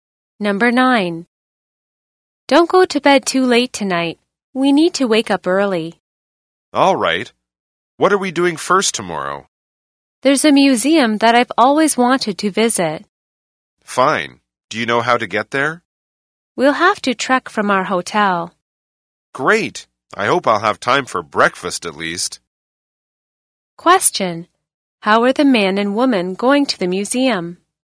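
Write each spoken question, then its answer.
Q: How are the man and woman going to the museum?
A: They will walk (trek) from their hotel.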